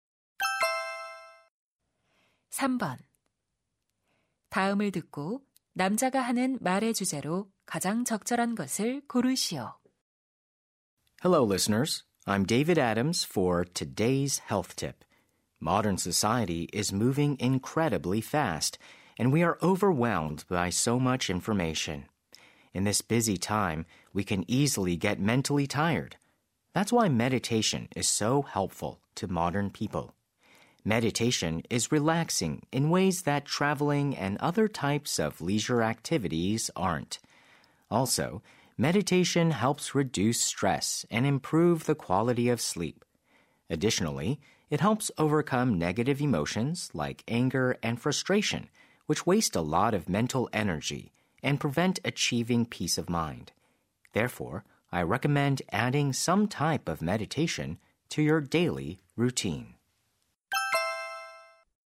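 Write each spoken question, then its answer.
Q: 다음을 듣고 남자가 하는 말의 주제로 가장 적절한 것을 고르시오.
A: 명상의 이점 (현대인에게 명상이 도움이 되는 이유)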